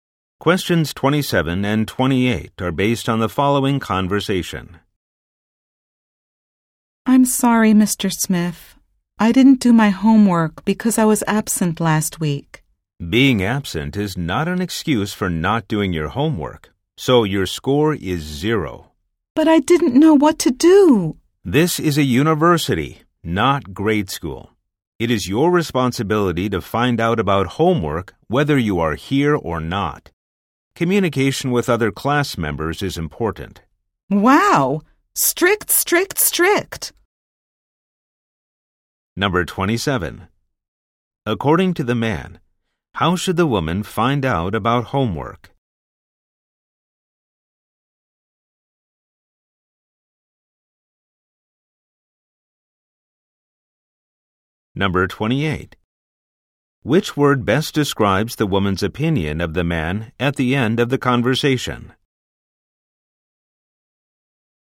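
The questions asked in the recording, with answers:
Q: According to the man, how should the woman find out about homework?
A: By communicating with other class members

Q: Which word best describes the woman's opinion of the man at the end of the conversation?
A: Strict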